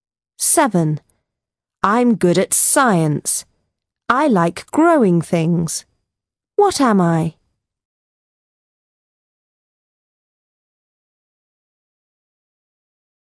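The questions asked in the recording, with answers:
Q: What am I?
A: farmer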